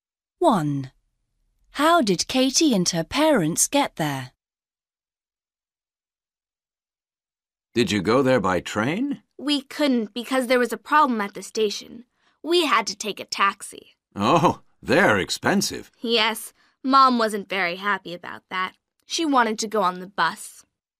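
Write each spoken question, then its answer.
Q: How did Katie and her parents get there?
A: By taxi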